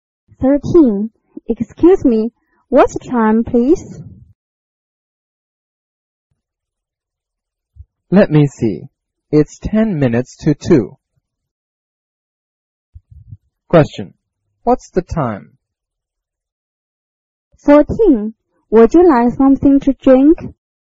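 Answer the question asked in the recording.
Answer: 1:50 (ten to two)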